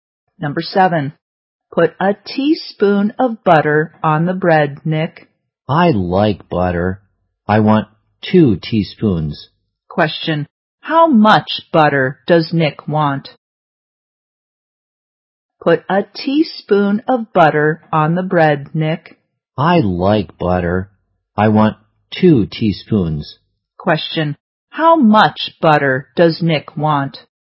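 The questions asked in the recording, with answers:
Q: how much butter does Nick want?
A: Two teaspoons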